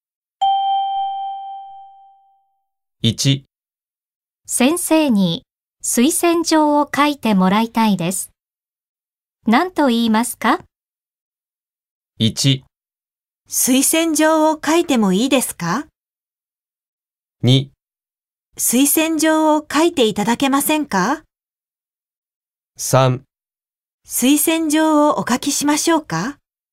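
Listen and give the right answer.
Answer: 2: 推薦状を書いていただけませんか?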